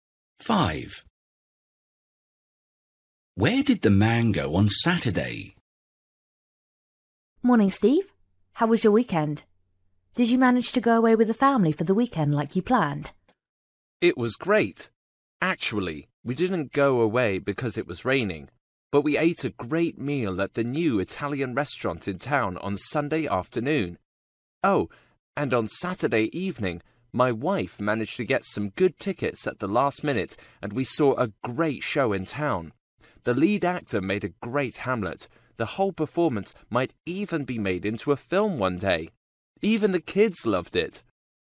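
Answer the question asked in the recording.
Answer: To the theatre, to see Hamlet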